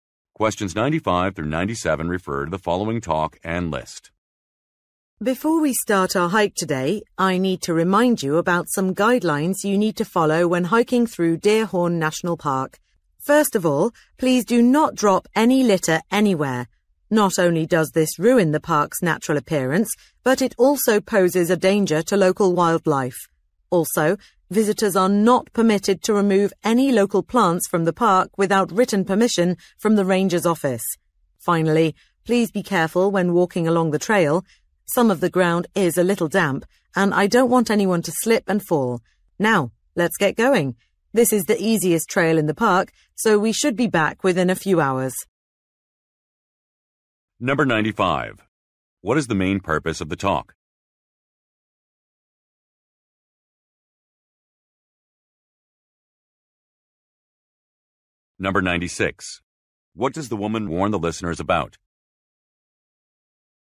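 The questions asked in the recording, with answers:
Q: What is the main purpose of the talk?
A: To explain park hiking guidelines

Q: What does the woman warn the listeners about?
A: Slipping on damp ground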